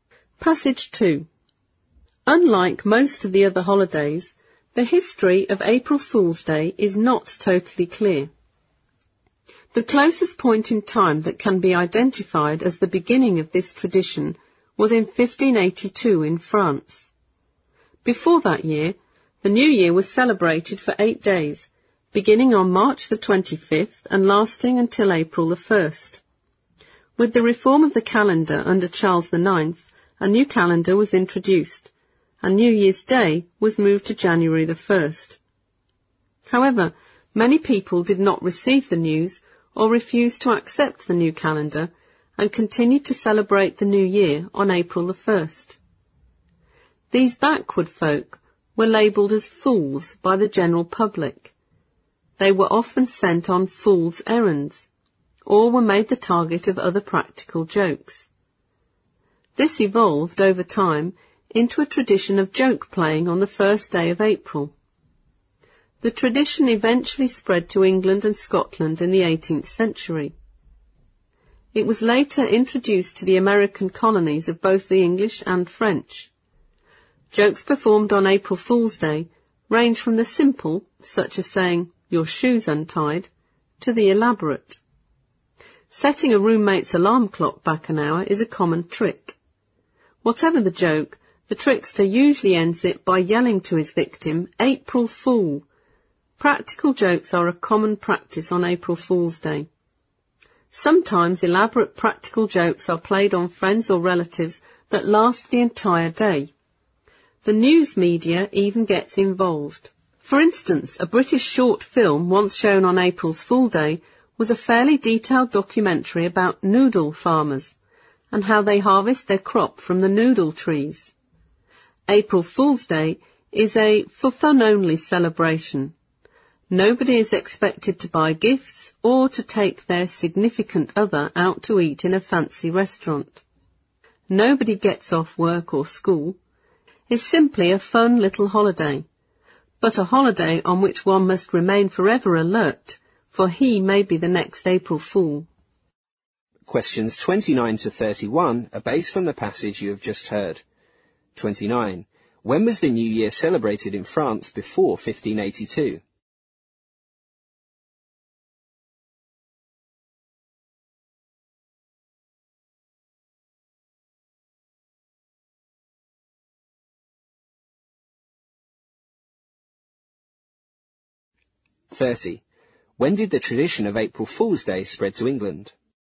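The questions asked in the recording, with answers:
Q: When was the New Year celebrated in France before 1582?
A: For 8 days, from March 25 to April 1

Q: When did the tradition of April Fool's Day spread to England?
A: In the 18th century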